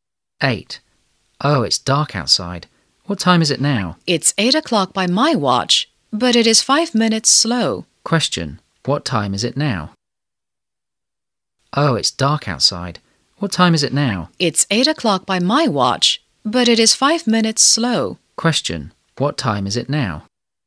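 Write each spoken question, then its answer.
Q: What time is it now?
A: 8:05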